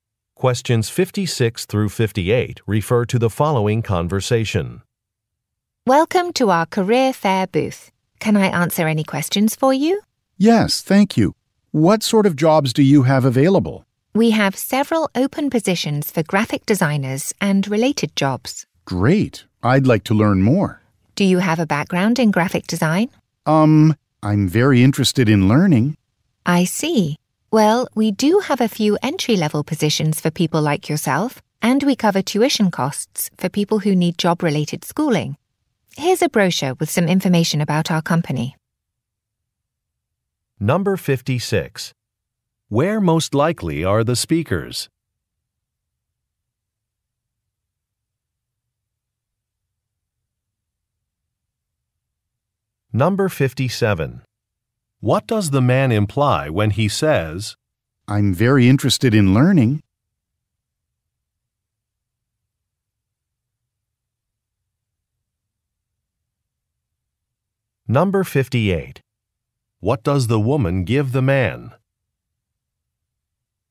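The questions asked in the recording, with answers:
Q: Where most likely are the speakers?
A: At a career fair

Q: What does the man imply when he says,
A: He has no background in graphic design

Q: What does the woman give the man?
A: A brochure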